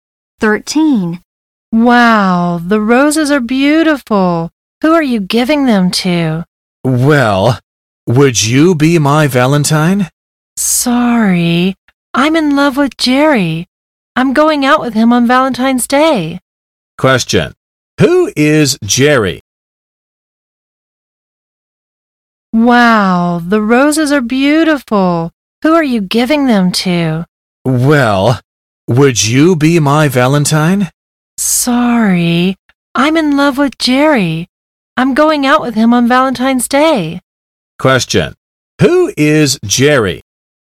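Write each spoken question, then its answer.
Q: Question, who is Jerry?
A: The person the woman is in love with; she is going out with him on Valentine's Day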